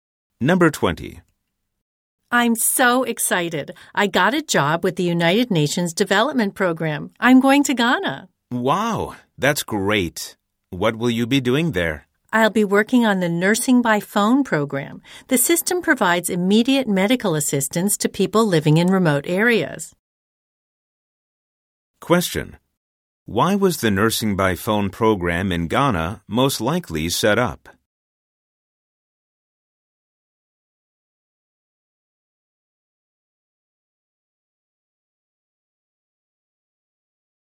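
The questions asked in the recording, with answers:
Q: Why was the Nursing by Phone program in Ghana most likely set up?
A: To give medical help to people in remote areas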